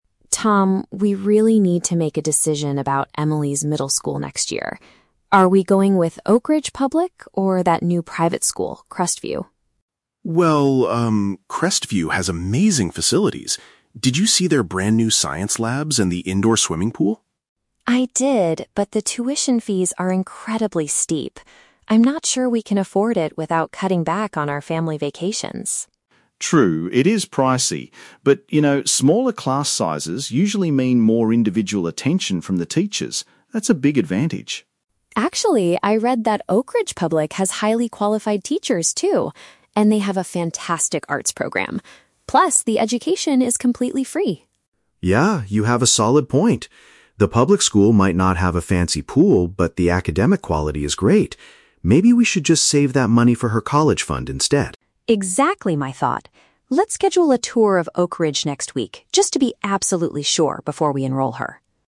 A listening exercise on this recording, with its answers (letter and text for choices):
Listen to the conversation between a husband and a wife, and choose the correct answer (A, B, or C) for each question.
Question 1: What impresses Tom the most about Crestview school?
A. Its highly qualified teaching staff.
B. Its modern learning and sports equipment.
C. Its convenient location near their house.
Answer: B. Its modern learning and sports equipment.

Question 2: Why is Lisa hesitant to send their daughter to the private school?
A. The high costs would affect their current lifestyle.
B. The class sizes are too small for socializing.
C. The school does not offer a good arts program.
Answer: A. The high costs would affect their current lifestyle.

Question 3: What do they agree to do with the money they will save?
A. Take a more expensive family vacation.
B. Donate it to the public school's art department.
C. Keep it for Emily's future university education.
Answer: C. Keep it for Emily's future university education.

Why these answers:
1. Tom mentions that Crestview has "amazing facilities," specifically "science labs" (learning equipment) and an "indoor swimming pool" (sports equipment). Option B paraphrases these details perfectly. The Trap: Option (A) is a trap. "Highly qualified teachers" is a phrase used by Lisa to describe Oakridge Public, not Crestview. Option (C) is plausible but never mentioned.
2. Lisa says the tuition fees are "incredibly steep" (high costs) and they would have to start "cutting back on our family vacations" (affecting their lifestyle). Option A summarizes this idea. The Trap: Option (B) mentions "small class sizes", which is actually seen as a positive thing by Tom, not a reason for hesitation. Option (C) mentions the arts program, but the public school's arts program is praised; Lisa doesn't criticize the private school's arts program.
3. Tom suggests they should "save that money for her college fund," and Lisa agrees ("Exactly my thought"). Option C paraphrases "college fund" as "future university education." The Trap: Option (A) is a trap because "family vacations" were mentioned earlier as something they might have to give up if they chose the private school, not what they will spend the saved money on. Option (B) combines the words "donate" and "art program" (mentioned earlier), making it a distractor for those who only listen for keywords.

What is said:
Lisa: Tom, we really need to make a decision about Emily's middle school next year. Are we going with Oakridge Public or that new private school, Crestview?
Tom: Well, um, Crestview has amazing facilities. Did you see their brand new science labs and the indoor swimming pool?
Lisa: I did, but the tuition fees are incredibly steep. I'm not sure we can afford it without cutting back on our family vacations.
Tom: True, it is pricey. But you know, smaller class sizes usually mean more individual attention from the teachers. That's a big advantage.
Lisa: Actually, I read that Oakridge Public has highly qualified teachers, too. And they have a fantastic arts program. Plus, the education is completely free.
Tom: Yeah, you have a solid point. The public school might not have a fancy pool, but the academic quality is great. Maybe we should just save that money for her college fund instead.
Lisa: Exactly my thought. Let's schedule a tour of Oakridge next week just to be absolutely sure before we enroll her.